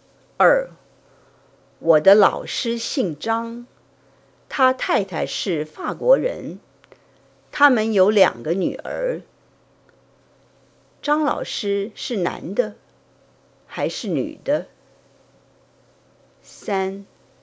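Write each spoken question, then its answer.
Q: 张老师是男的还是女的?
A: 男的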